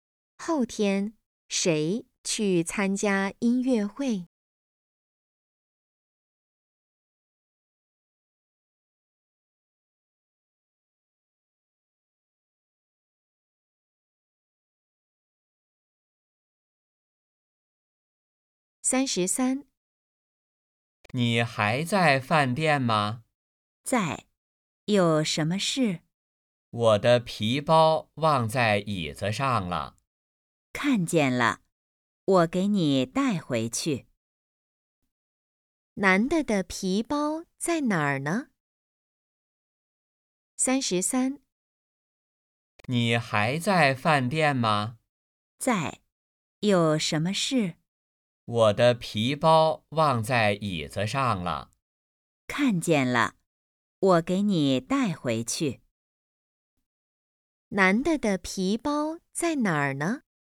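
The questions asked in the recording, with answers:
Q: 男的的皮包在哪儿呢?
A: 饭店的椅子上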